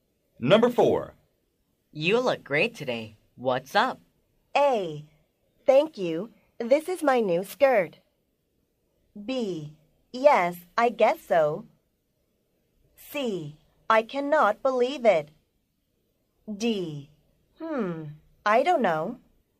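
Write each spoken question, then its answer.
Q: You look great today. What's up?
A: A: Thank you. This is my new skirt.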